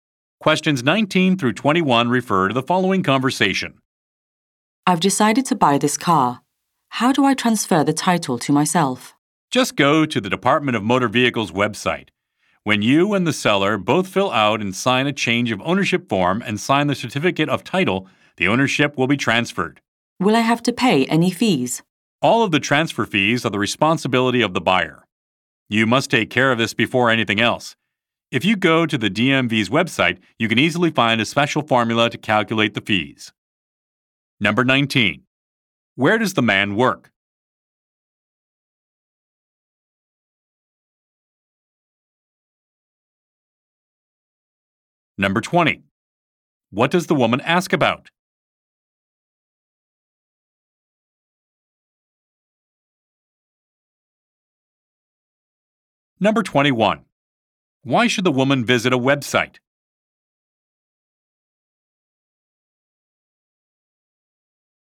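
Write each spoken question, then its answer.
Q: Why should the woman visit a website?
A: To calculate the fees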